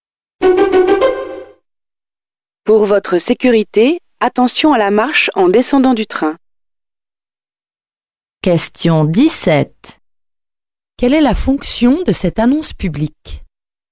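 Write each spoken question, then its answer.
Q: Quelle est la fonction de cette annonce publique?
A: Prévenir d'un danger (faire attention à la marche)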